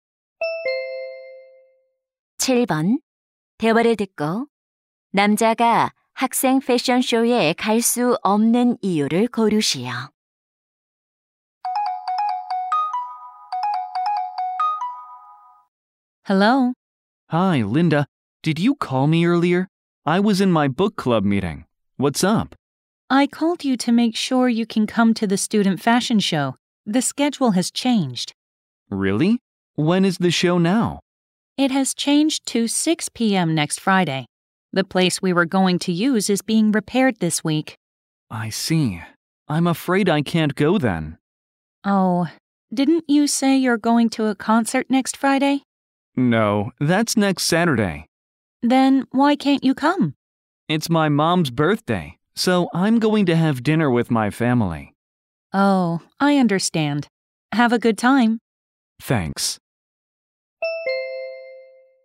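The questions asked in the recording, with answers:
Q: 대화를 듣고 남자가 학생 패션쇼에 갈 수 없는 이유를 고르시오.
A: 엄마 생신이라 가족과 저녁 식사를 해야 해서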